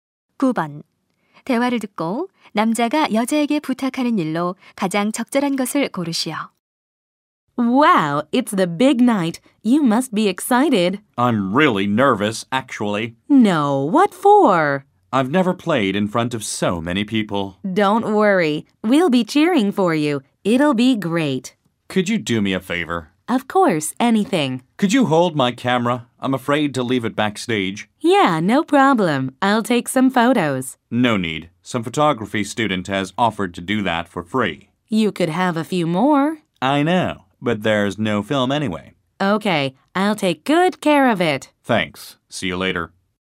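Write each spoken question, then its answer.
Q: 대화를 듣고 남자가 여자에게 부탁하는 일로 가장 적절한 것을 고르시오.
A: 카메라 보관해 주기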